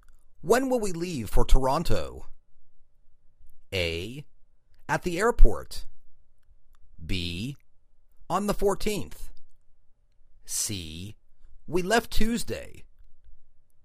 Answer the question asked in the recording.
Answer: On the 14th.